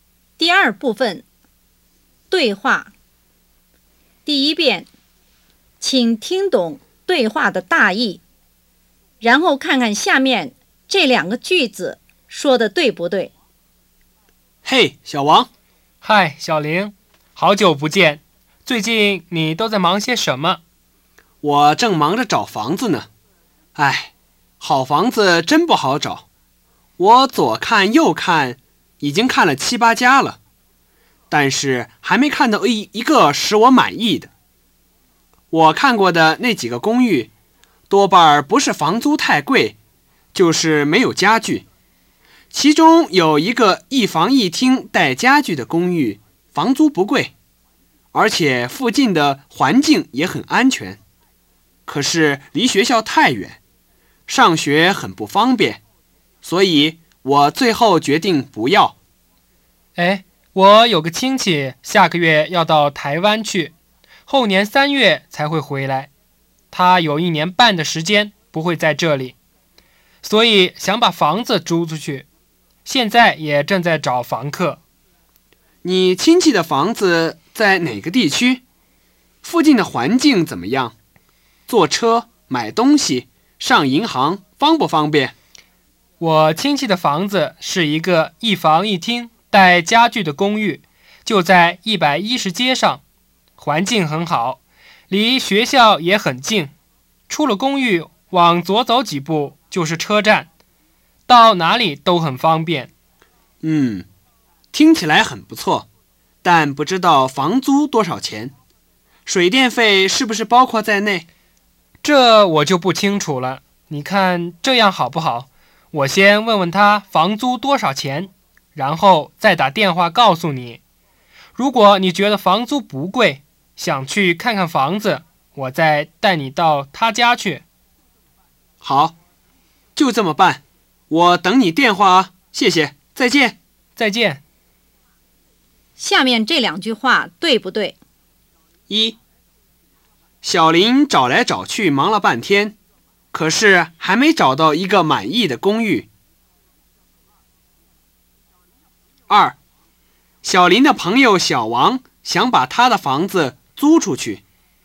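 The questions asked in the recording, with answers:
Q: 小林的朋友小王想把他的房子租出去。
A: 不对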